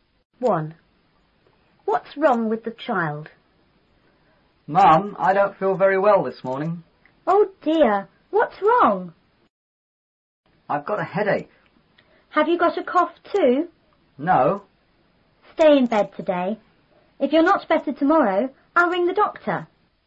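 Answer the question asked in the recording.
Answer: He has got a headache.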